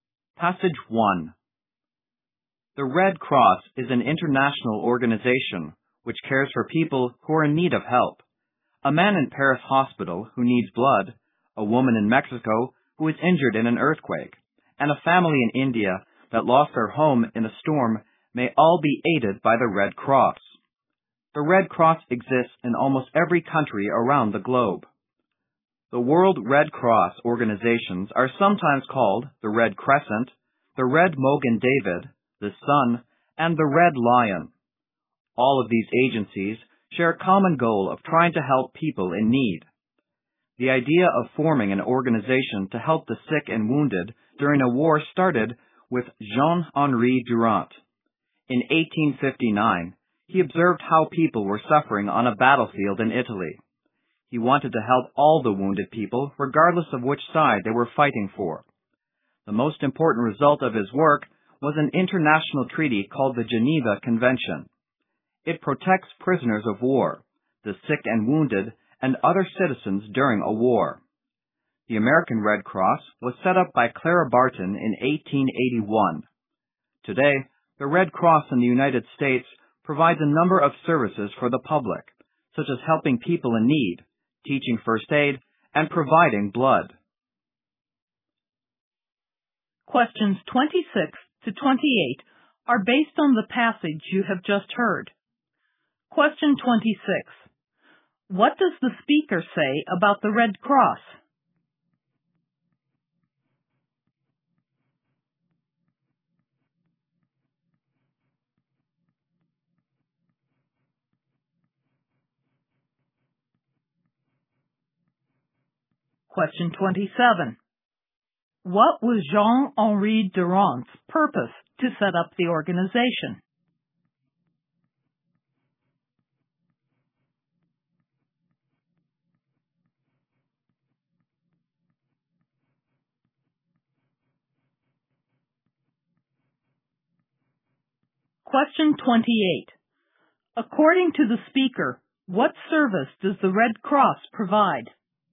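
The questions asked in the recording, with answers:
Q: What does the speaker say about the Red Cross?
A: It is an international organization that helps people in need, in almost every country.

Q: What was Jean-Henri Durant's purpose to set up the organization?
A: To help the sick and wounded in war, whichever side they fought for.

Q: According to the speaker, what service does the Red Cross provide?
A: Helping people in need, teaching first aid and providing blood.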